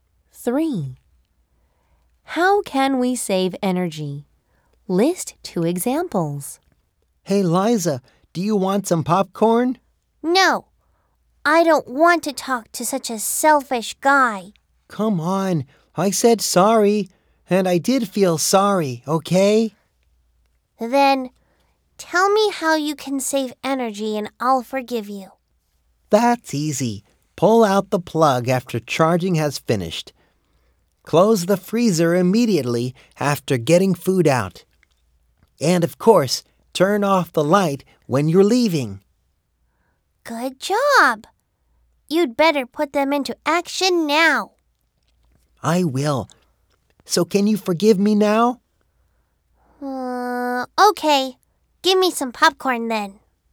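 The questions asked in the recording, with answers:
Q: How can we save energy?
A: Pull out the plug after charging and turn off the light when leaving.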